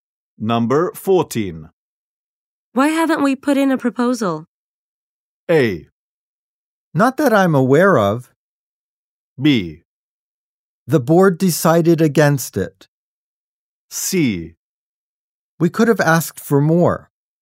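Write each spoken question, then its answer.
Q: Why haven't we put in a proposal?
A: B: The board decided against it.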